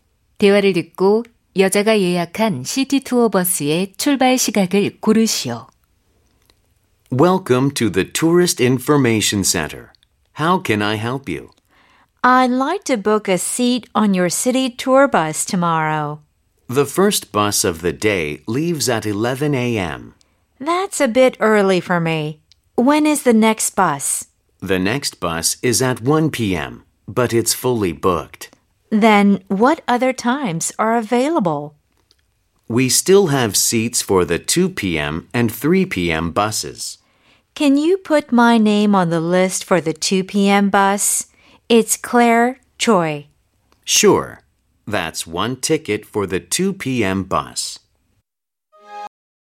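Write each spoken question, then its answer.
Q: 4번 대화를 듣고 여자가 예약한 시티 투어 버스의 출발 시각을 고르시오.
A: 오후 2시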